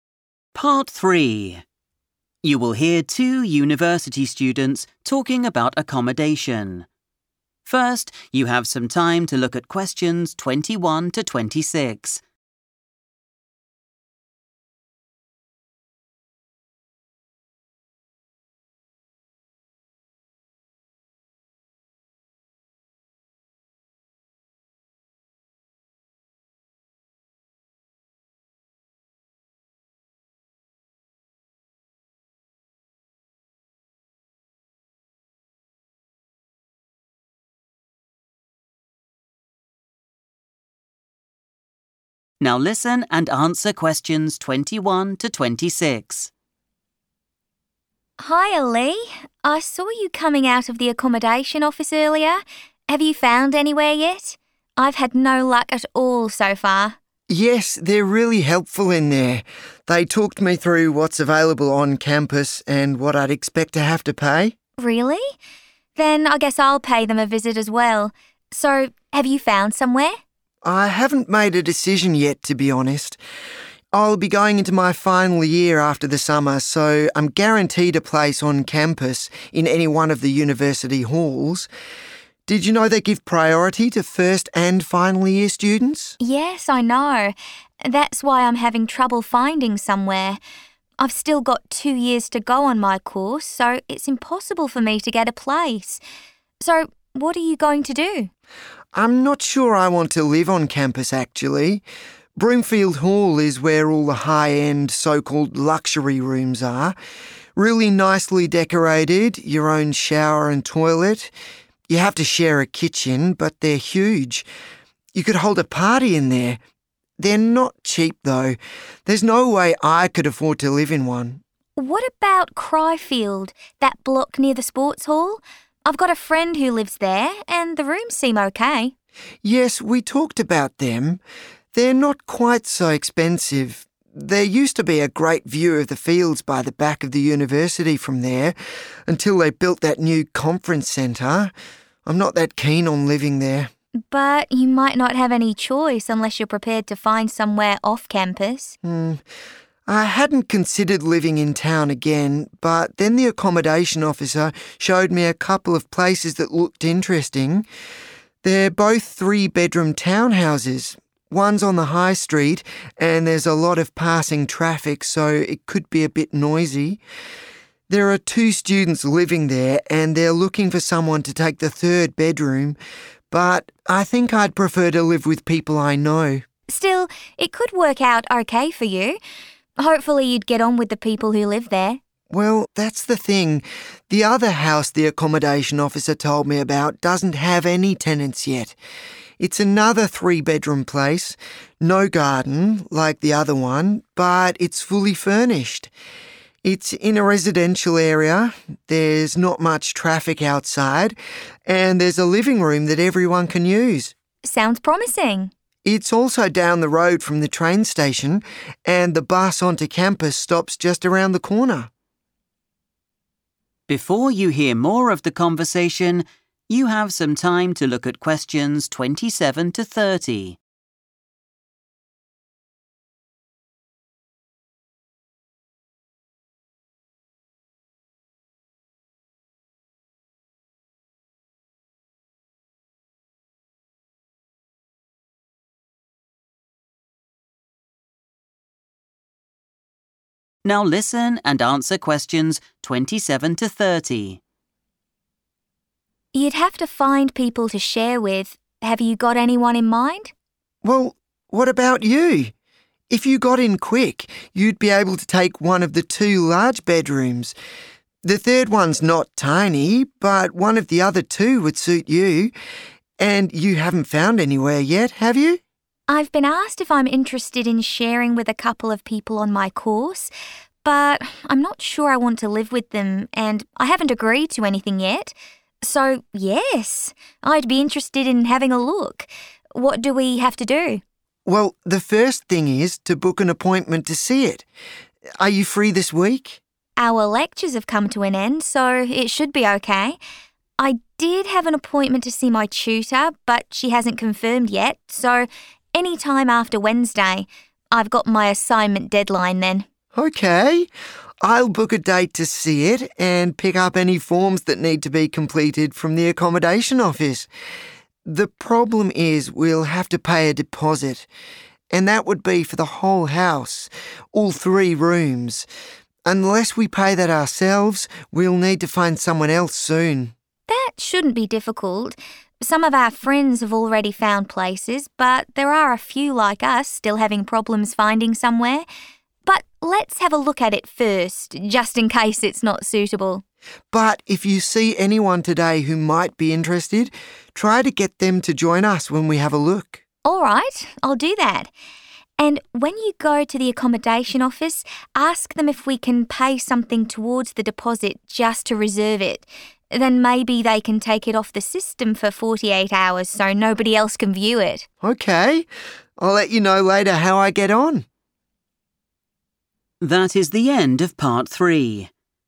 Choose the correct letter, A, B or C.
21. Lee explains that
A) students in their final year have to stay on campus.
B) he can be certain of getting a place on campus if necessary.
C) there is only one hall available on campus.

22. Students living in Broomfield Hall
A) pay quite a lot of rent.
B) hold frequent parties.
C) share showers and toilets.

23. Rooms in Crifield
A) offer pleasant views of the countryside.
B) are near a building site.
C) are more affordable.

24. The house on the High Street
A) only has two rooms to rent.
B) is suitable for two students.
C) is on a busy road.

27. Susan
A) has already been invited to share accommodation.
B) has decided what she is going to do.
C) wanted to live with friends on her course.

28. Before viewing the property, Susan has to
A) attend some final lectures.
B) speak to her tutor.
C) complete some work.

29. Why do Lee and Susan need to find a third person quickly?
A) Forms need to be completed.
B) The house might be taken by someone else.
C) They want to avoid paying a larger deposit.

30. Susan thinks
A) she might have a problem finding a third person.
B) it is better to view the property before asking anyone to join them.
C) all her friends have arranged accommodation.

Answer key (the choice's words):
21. he can be certain of getting a place on campus if necessary.
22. pay quite a lot of rent.
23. are more affordable.
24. is on a busy road.
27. has already been invited to share accommodation.
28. complete some work.
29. They want to avoid paying a larger deposit.
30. it is better to view the property before asking anyone to join them.

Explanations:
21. The correct answer is B because Lee mentions he is going into his final year and is 'guaranteed' a place in the university halls. In English, 'guaranteed' means that something is certain to happen or promised. He also mentions that the university gives 'priority' to final year students, meaning they are given a place first before others. Choice A is incorrect because while he is guaranteed a place, he doesn't 'have to' (must) stay there; he can choose to live elsewhere. Choice C is incorrect because he refers to 'any one' of the halls, which implies there is more than one.
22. The correct answer is A because Lee explains that Broomfield Hall contains expensive "luxury" rooms. He specifically mentions that "they're not cheap" and that he doesn't have enough money to stay there. This confirms that the rent is high. Choice B is incorrect because while he says the kitchens are big enough to have a party, he doesn't say students actually have them frequently. Choice C is incorrect because he states that rooms have their "own shower and toilet," which means they are not shared.
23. The correct answer is **C** because Lee says the rooms in Crifield are "not quite so expensive." This is a synonym for being "more affordable," meaning they cost less money. Lee compares these to the luxury rooms at Broomfield Hall, which he says are not cheap and that he cannot afford. Although he mentions a view, he says the view is gone now, making choice A incorrect.
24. The correct answer is C because Lee says there is a lot of "passing traffic" at that house. When there is a lot of traffic, it means the road is very busy. This matches the phrase "busy road" used in the answer choice. He also notes that because of all this traffic, the house could be a bit "noisy."
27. The correct answer is A because the text mentions that Susan was 'asked' by people from her course to share a home with them. In this context, being 'asked' is a synonym for being 'invited'. Although she mentions she hasn't 'agreed to anything yet' and is 'not sure' if she wants to live with those specific people, the invitation itself has already taken place. This makes A the only correct choice, as she has not yet 'decided' (ruling out B) and she is unsure if she 'wants' to live with those specific classmates (ruling out C).
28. The correct answer is C because Susan says she will get and finish some paperwork before visiting the house. In the conversation, she says she will 'pick up any forms that need to be completed.' To 'complete' a form means to finish a task or 'work.' Other answers are wrong because choice A mentions lectures, but Lee says lectures are already over. Choice B says she has to talk to a teacher (tutor), but Lee is the one waiting for his teacher, not Susan.
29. The correct answer is C because Susan mentions that they have to pay a deposit for the entire house, including all three bedrooms. If they do not find a third person ('someone else') soon, Lee and Susan will have to pay the full amount of the deposit for the empty room ('pay that ourselves'). Finding a third person helps them share the cost so they do not have to pay a larger amount.
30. The correct answer is B because Susan highlights that visiting the property is the highest priority. When the discussion turns toward sharing a house, she immediately states that the first step is to see it. When Lee suggests they should check if the place is 'suitable' before worrying about roommates, Susan agrees with the sequence and further suggests inviting potential roommates to that initial viewing. This shows she thinks the house should be viewed by everyone before a final decision to 'join' the tenancy is made. Keywords like 'first thing', 'see it', and 'when we have a look' emphasize this focus on viewing.

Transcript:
Susan: Hiya, Lee. I saw you coming out of the accommodation office earlier. Have you found anywhere yet? I've had no luck at all so far.
Lee: Yes, they're really helpful in there. They talked me through what's available on campus and what I'd expect to have to pay.
Susan: Really? Then I guess I'll pay them a visit as well. So, have you found somewhere?
Lee: I haven't made a decision yet, to be honest. I'll be going into my final year after the summer so I'm guaranteed a place on campus in any one of the university halls. Did you know they give priority to first and final year students?
Susan: Yes, I know. That's why I'm having trouble finding somewhere. I've still got two years to go on my course so it's impossible for me to get a place. So, what are you going to do?
Lee: I'm not sure I want to live on campus, actually. Broomfield Hall is where all the high-end, so-called luxury rooms are. Really nicely decorated, your own shower and toilet. You have to share a kitchen, but they're huge. You could hold a party in there. They're not cheap, though. There's no way I could afford to live in one.
Susan: What about Crifield – that block near the sports hall? I've got a friend who lives there and the rooms seem OK.
Lee: Yes, we talked about them. They're not quite so expensive. There used to be a great view of the fields by the back of the university from there until they built that new conference centre. I'm not that keen on living there.
Susan: But you might not have any choice unless you're prepared to find somewhere off campus.
Lee: I hadn't considered living in town again but then the accommodation officer showed me a couple of places that looked interesting. They're both three-bedroom town houses. One's on the High Street and there's a lot of passing traffic so it could be a bit noisy. There are two students living there and they're looking for someone to take the third bedroom, but I think I'd prefer to live with people I know.
Susan: Still, it could work out OK for you. Hopefully you'd get on with the people who live there.
Lee: Well, that's the thing. The other house the accommodation officer told me about doesn't have any tenants yet. It's another three-bedroom place. No garden, like the other one, but it's fully furnished. It's in a residential area, there's not much traffic outside and there's a living room that everyone can use. Sounds promising.
Susan: It's also down the road from the train station, and the bus onto campus stops just around the corner.
Lee: You'd have to find people to share with. Have you got anyone in mind?
Susan: Well, what about you? If you got in quick, you'd be able to take one of the two large bedrooms. The third one's not tiny but one of the other two would suit you. And you haven't found anywhere yet, have you?
Lee: I've been asked if I'm interested in sharing with a couple of people on my course, but I'm not sure I want to live with them and I haven't agreed to anything yet. So, yes, I'd be interested in having a look. What do we have to do?
Susan: Well, the first thing is to book an appointment to see it. Are you free this week?
Lee: Our lectures have come to an end so it should be OK. I did have an appointment to see my tutor but she hasn't confirmed yet so any time after Wednesday. I've got my assignment deadline then.
I'll book a date to see it and pick up any forms that need to be completed from the accommodation office. The problem is we'll have to pay a deposit. And that would be for the whole house, all three rooms. Unless we pay that ourselves, we'll need to find someone else soon.
Lee: That shouldn't be difficult. Some of our friends have already found places but there are a few like us still having problems finding somewhere. But let's have a look at it first, just in case it's not suitable.
Susan: But if you see anyone today who might be interested, try to get them to join us when we have a look.
Lee: All right. I'll do that. And when you go to the accommodation office, ask them if we can pay something towards the deposit just to reserve it. Then maybe they can take it off the system for 48 hours so nobody else can view it.
Susan: OK, I'll let you know later how I get on.